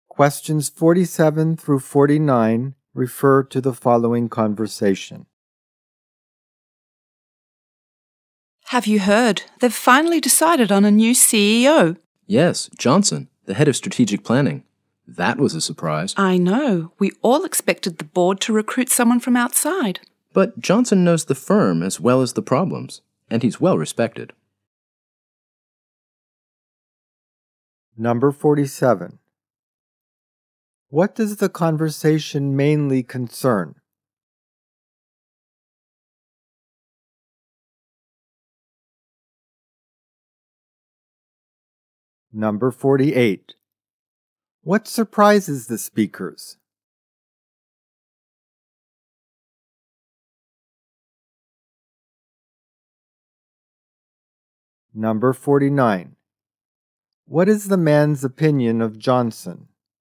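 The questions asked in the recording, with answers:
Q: What does the conversation mainly concern?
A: The choice of a new CEO

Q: What surprises the speakers?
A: The new CEO was chosen from inside the company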